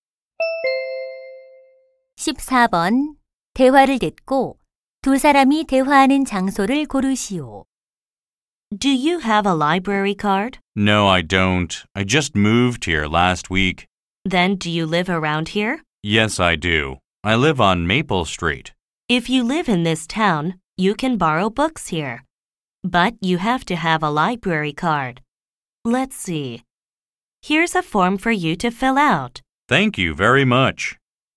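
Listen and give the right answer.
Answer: 도서관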